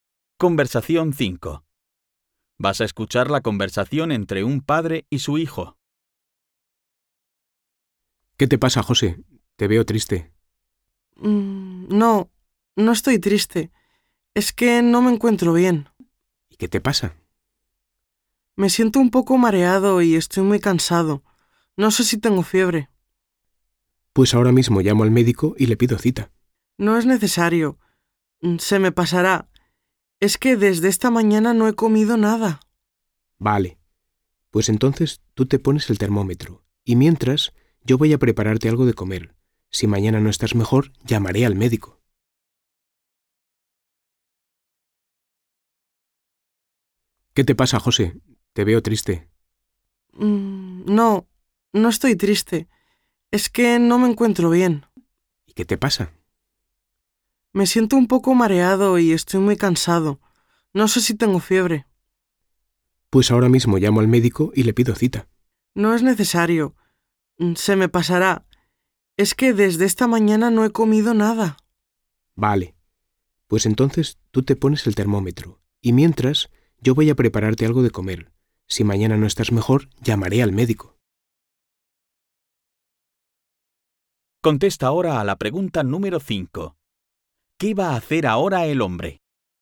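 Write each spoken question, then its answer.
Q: ¿Qué va a hacer ahora el hombre?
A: Preparar algo de comer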